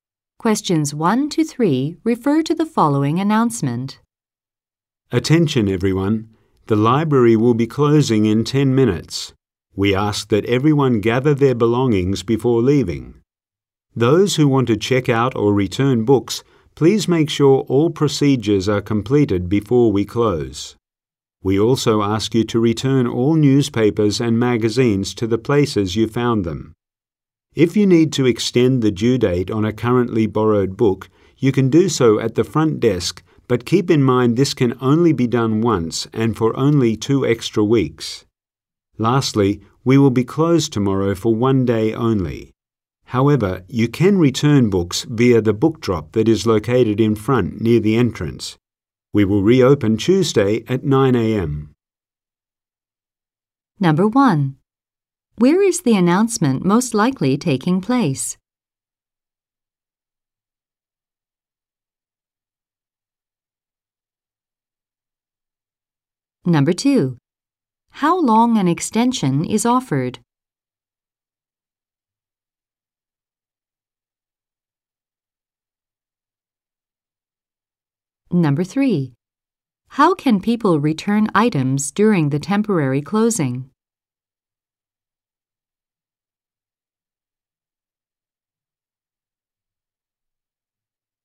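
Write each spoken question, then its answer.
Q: Where is the announcement most likely taking place?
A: In a library

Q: How long an extension is offered?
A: 2 weeks

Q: How can people return items during the temporary closing?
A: Through the book drop in front near the entrance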